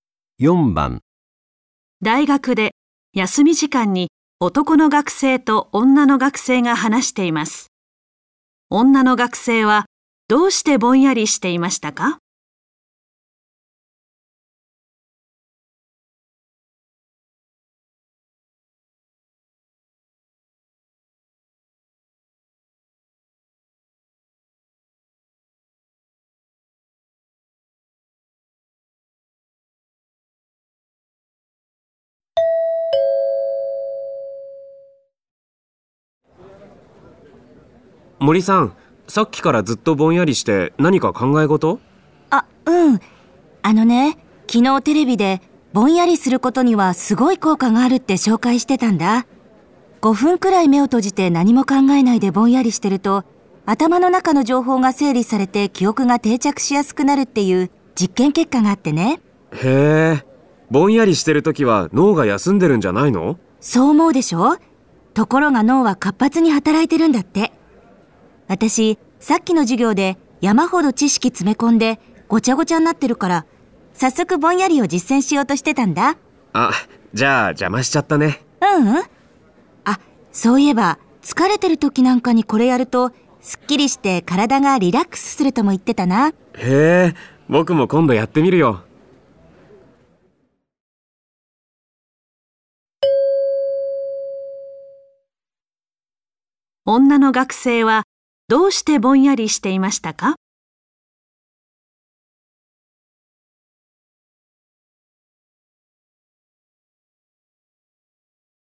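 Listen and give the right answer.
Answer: 授業で得た知識を頭の中で整理するため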